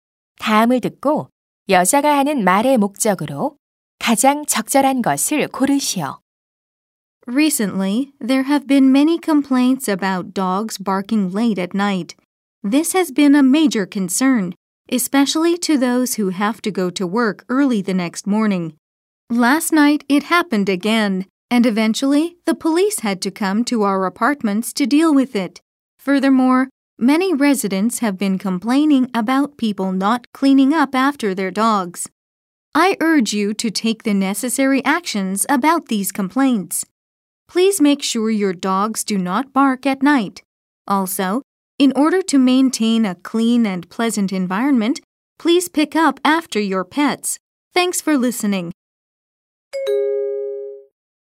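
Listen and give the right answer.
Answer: 주민들에게 밤에 개가 짖지 않도록 하고 반려동물의 배설물을 치워 달라고 당부하려고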